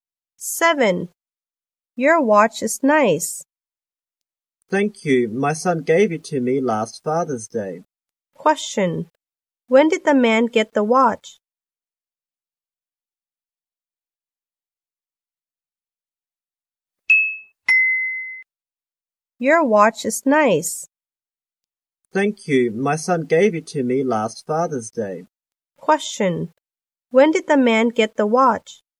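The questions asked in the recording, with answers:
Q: When did the man get the watch?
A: Last Father's Day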